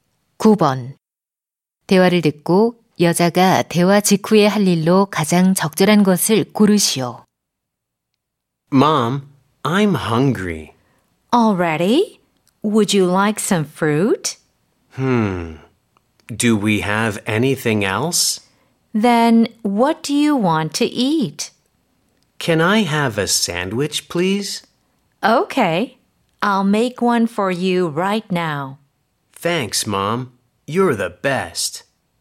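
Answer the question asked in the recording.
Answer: 샌드위치 만들기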